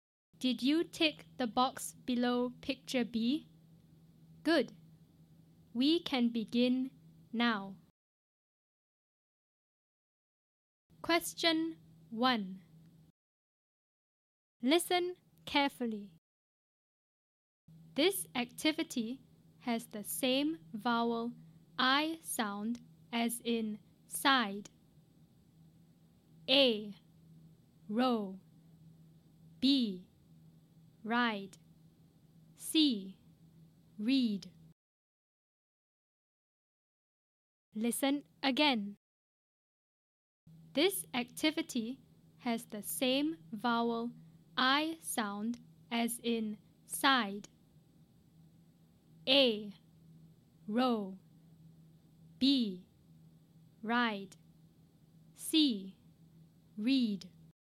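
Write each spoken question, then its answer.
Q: This activity has the same vowel I sound as in side.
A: B: Ride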